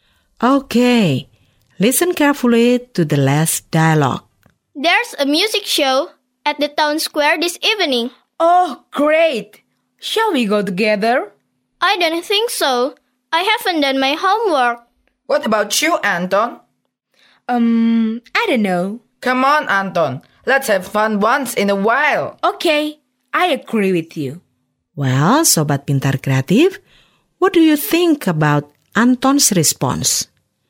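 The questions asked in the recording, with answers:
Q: Well, Sobat Pintar Kreatif, what do you think about Anton's response?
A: Agreeing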